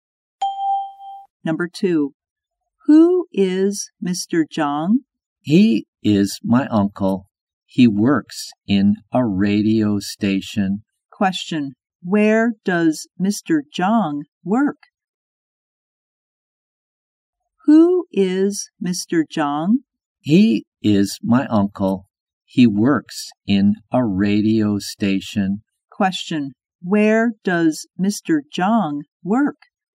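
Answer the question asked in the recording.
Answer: In a radio station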